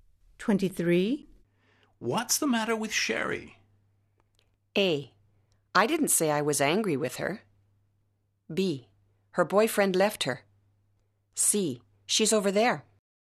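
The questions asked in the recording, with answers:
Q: What's the matter with Sherry?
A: B: Her boyfriend left her.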